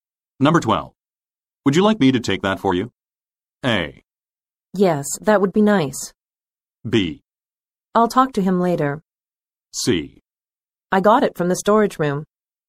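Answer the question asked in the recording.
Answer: A: Yes, that would be nice.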